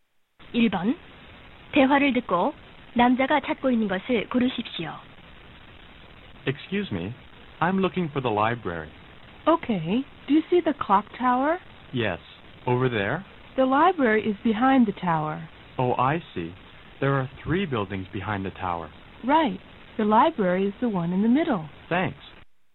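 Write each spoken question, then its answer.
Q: 1번 대화를 듣고 남자가 찾고 있는 것을 고르십시오.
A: 도서관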